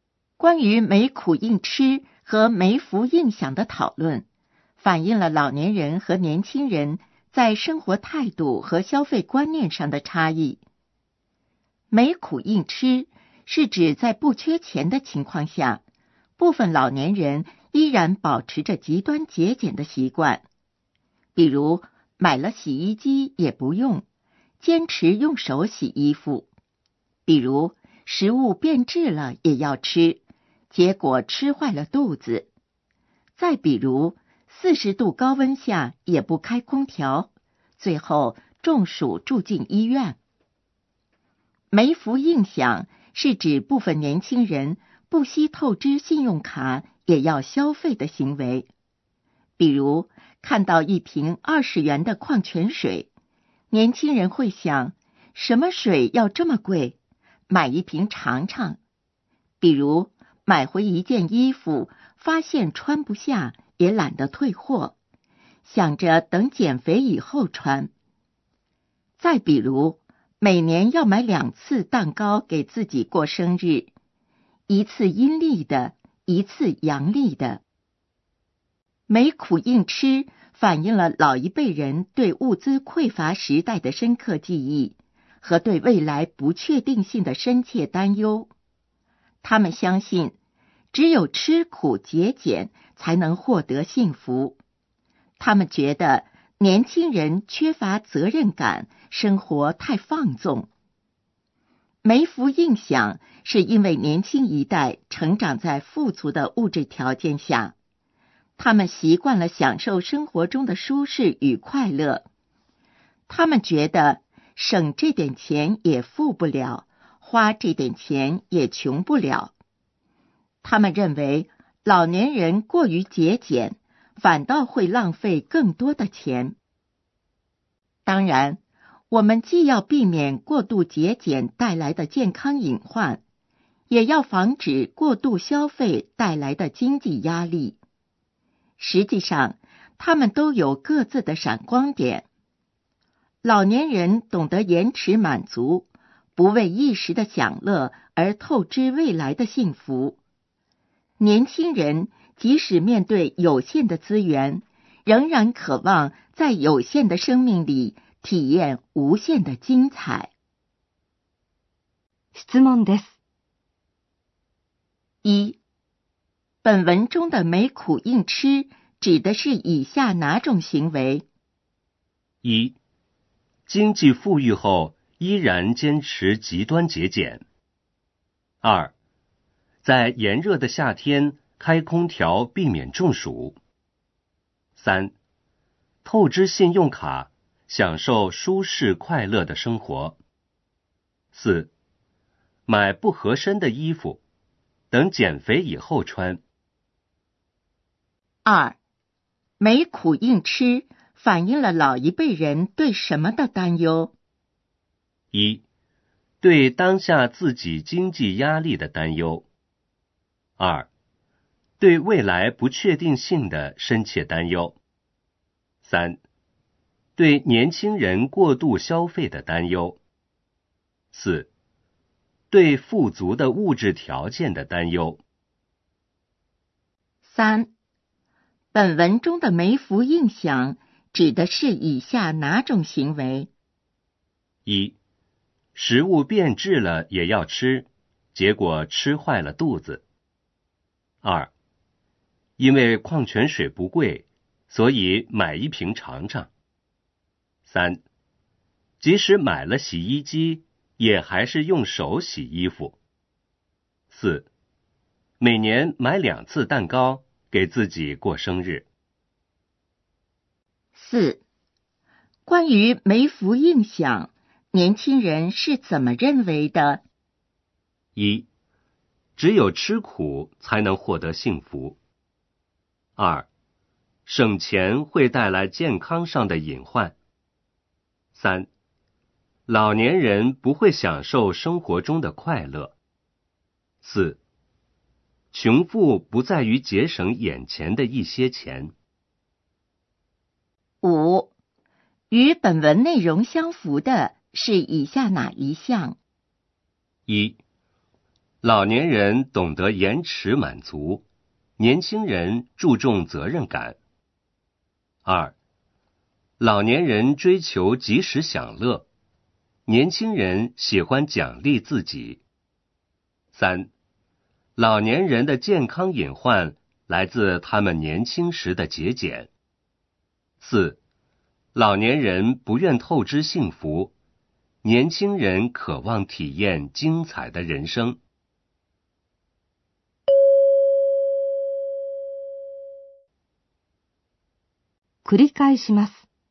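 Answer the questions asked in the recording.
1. 1: 经济富裕后依然坚持极端节俭。
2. 2: 对未来不确定性的深切担忧。
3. 4: 每年买两次蛋糕,给自己过生日。
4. 4: 穷富不在于节省眼前的一些钱。
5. 4: 老年人不愿透支幸福,年轻人渴望体验精彩的人生。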